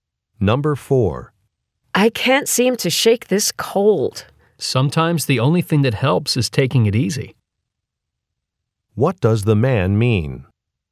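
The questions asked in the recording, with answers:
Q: What does the man mean?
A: The woman should rest.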